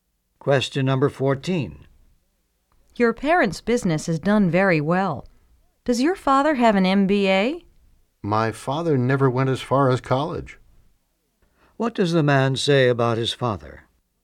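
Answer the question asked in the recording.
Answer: His father never went to college.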